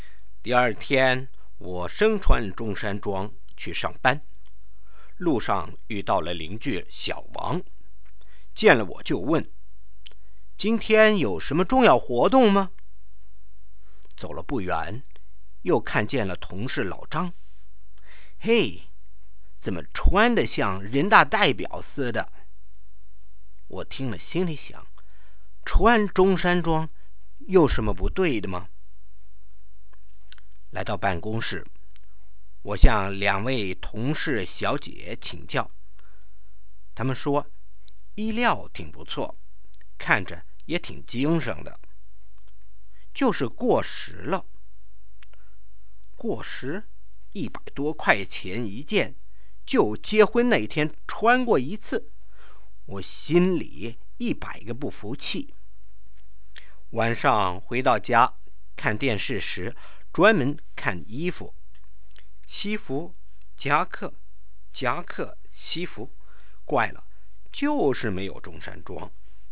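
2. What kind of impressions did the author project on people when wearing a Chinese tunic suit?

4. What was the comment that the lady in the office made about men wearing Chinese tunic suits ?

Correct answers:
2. People thought he was going to some important event, or that he was dressed like a deputy to the People's Congress.
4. The material was good and he looked smart, but the suit was out of date.

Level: 2nd Year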